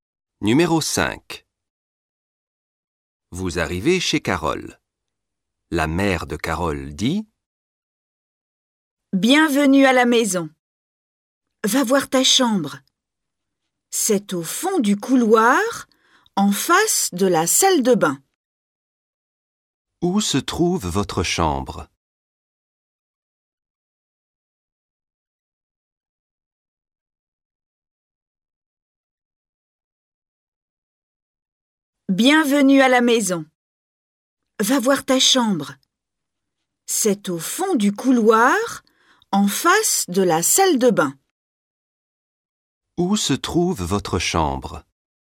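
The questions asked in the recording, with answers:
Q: Où se trouve votre chambre?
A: au fond du couloir, en face de la salle de bain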